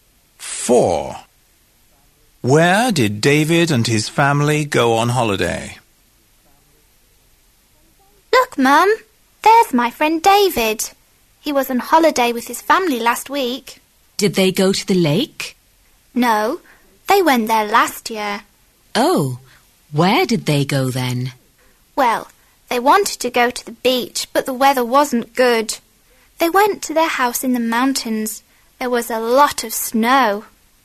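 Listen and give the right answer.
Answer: To their house in the mountains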